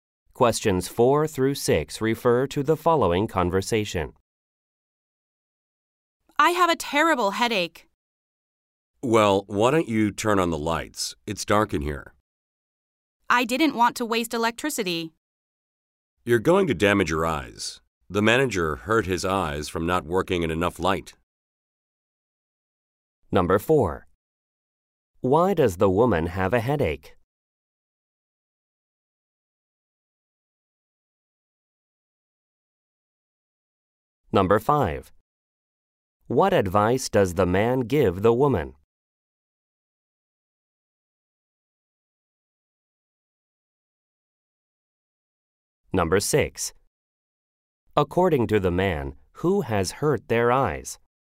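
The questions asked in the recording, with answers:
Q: Why does the woman have a headache?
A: She is working in the dark

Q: What advice does the man give the woman?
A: Turn on the lights

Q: According to the man, who has hurt their eyes?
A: The manager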